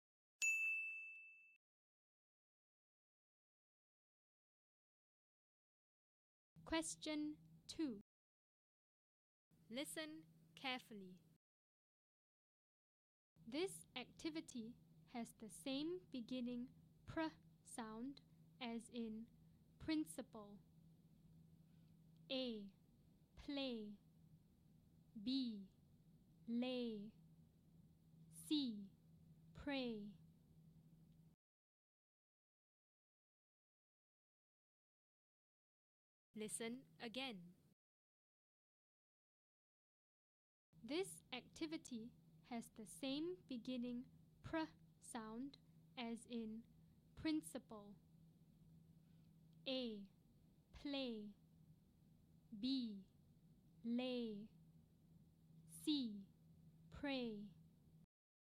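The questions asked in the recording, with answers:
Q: This activity has the same beginning pr sound as in principal.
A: C: Pray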